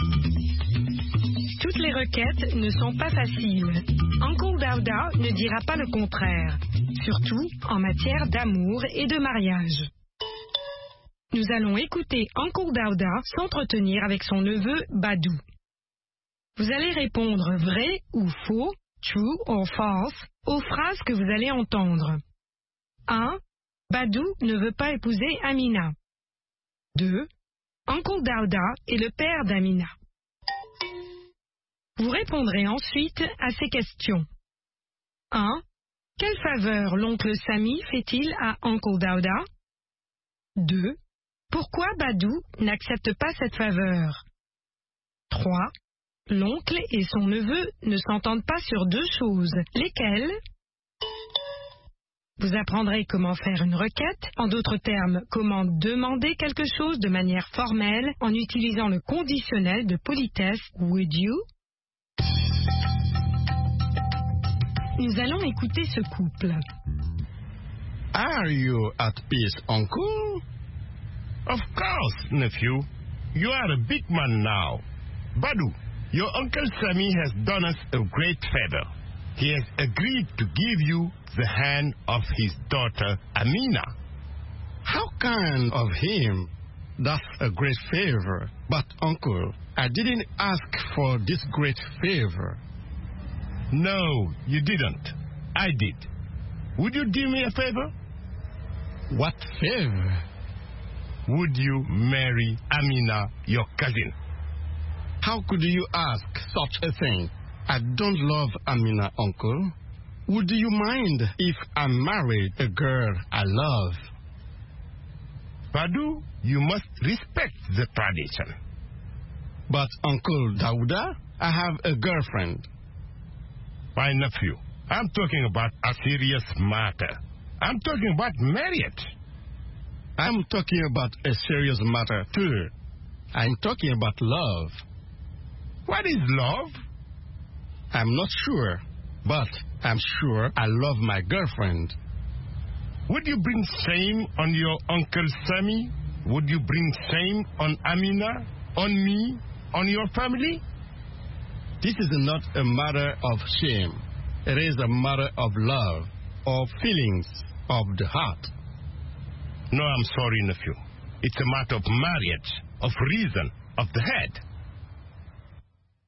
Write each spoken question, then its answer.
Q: Badou ne veut pas épouser Amina.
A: L'énoncé 1 est vrai. Badou ne veut pas épouser Amina.

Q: Uncle Dauda est le père d'Amina.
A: L'énoncé 2 est faux. Uncle Dauda est le père d'Amina.

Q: Quelle faveur l'oncle Sami fait-il à Uncle Dauda?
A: Il accepte d'accorder la main de sa fille à Badou.

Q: L'oncle et son neveu ne s'entendent pas sur deux choses.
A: Sur le mariage et sur l'amour.